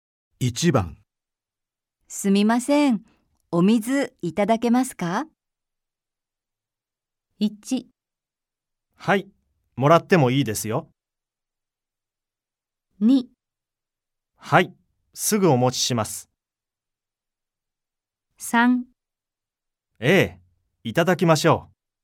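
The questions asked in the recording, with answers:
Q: すみません。お水いただけますか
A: 2: はい、すぐお持ちします。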